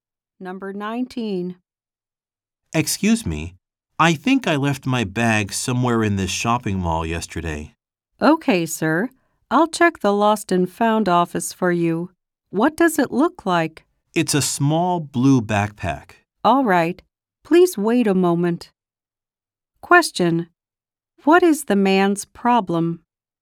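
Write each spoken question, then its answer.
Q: What is the man's problem?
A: He lost his bag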